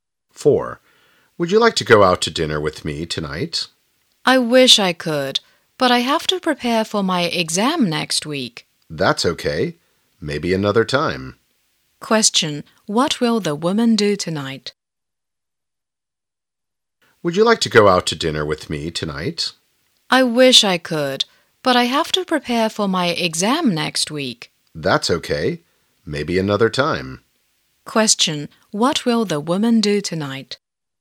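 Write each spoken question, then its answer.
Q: What will the woman do tonight?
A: Prepare for her exam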